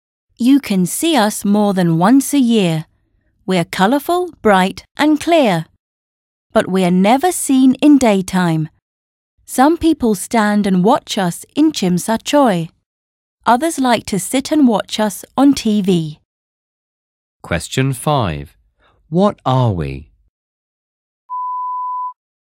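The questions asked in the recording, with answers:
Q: What are we?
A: fireworks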